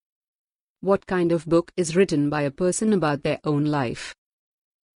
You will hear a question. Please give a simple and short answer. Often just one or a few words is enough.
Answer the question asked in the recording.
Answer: Autobiography